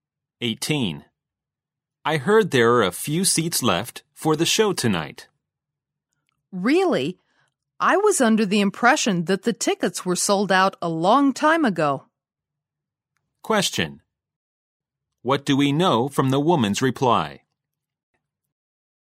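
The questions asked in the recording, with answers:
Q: What do we know from the woman's reply?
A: She thought the tickets had sold out long ago, so she is surprised.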